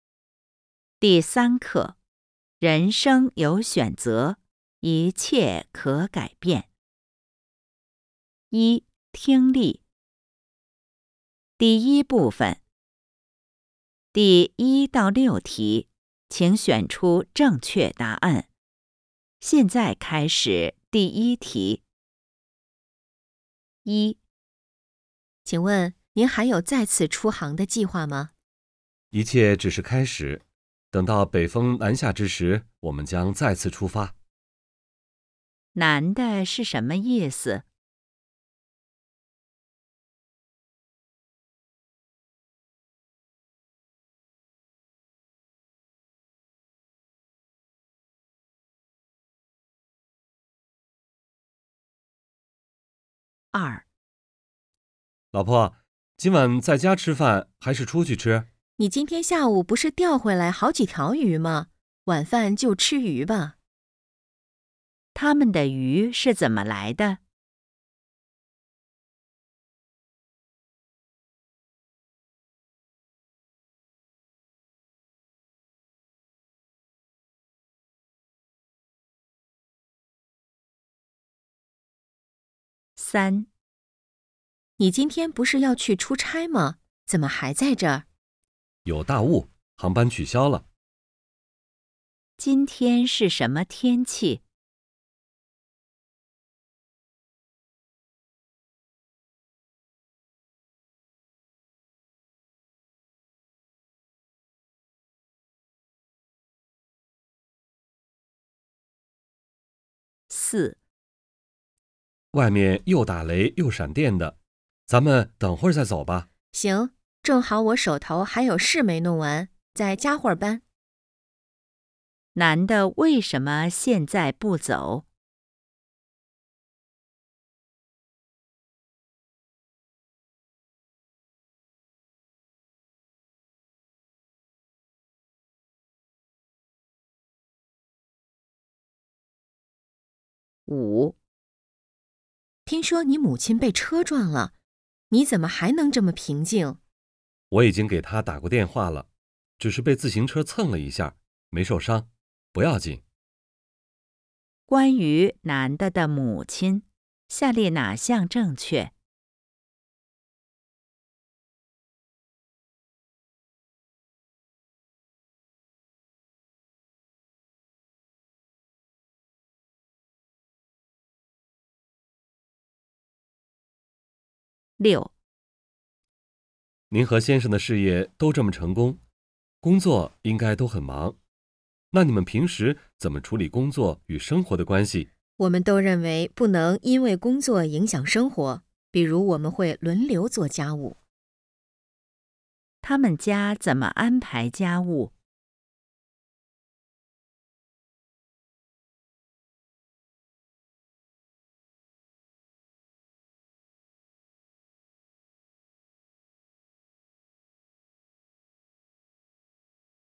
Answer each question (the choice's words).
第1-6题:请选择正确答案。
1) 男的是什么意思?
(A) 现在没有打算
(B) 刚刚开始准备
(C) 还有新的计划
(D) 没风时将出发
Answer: 还有新的计划

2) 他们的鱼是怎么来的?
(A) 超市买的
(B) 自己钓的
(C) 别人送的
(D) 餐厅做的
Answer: 自己钓的

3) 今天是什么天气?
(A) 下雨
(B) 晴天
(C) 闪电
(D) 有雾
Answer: 有雾

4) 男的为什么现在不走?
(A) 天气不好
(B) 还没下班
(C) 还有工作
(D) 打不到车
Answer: 天气不好

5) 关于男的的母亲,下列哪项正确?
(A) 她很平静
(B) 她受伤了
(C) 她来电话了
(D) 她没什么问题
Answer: 她没什么问题

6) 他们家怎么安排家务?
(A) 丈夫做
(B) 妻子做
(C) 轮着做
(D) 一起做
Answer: 轮着做

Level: HSK 5